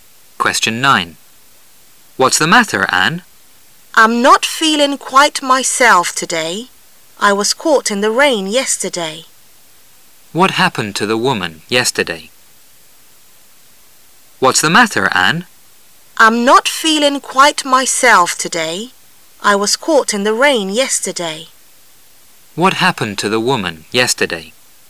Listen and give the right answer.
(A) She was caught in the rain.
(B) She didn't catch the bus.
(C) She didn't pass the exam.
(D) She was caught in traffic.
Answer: (A) She was caught in the rain.

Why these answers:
how much是用来询问多少钱的句式,故选项[A]20 dollars符合问话内容。